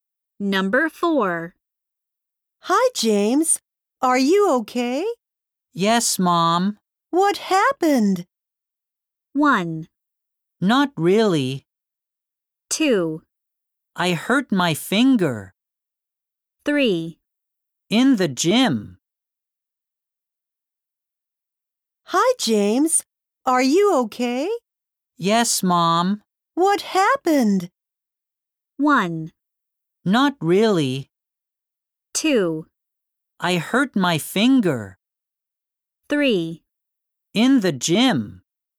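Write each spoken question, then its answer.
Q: What happened?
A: 2: I hurt my finger.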